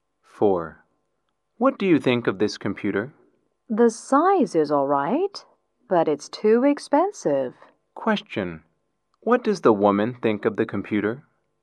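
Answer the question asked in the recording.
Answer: It's too expensive.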